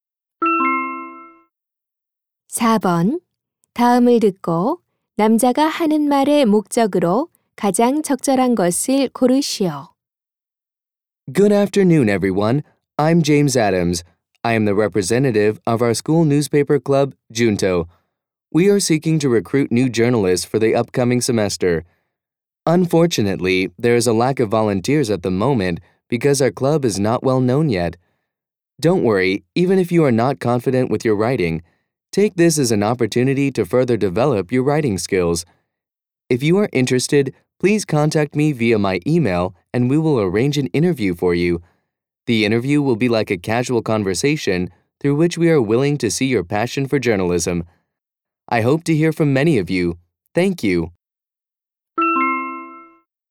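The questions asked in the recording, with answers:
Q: 다음을 듣고 남자가 하는 말의 목적으로 가장 적절한 것을 고르시오.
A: 학교 신문 동아리의 신입 기자 모집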